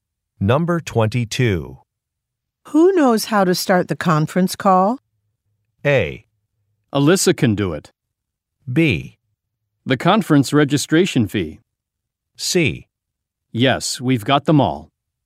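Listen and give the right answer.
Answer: A: Alyssa can do it.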